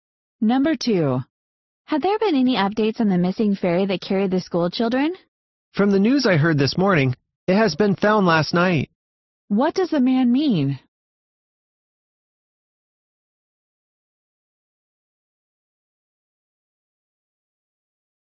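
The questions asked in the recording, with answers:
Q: What does the man mean?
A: The missing ferry was found last night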